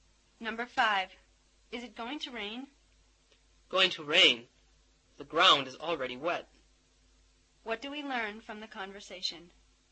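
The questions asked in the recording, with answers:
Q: What do we learn from the conversation?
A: It has already rained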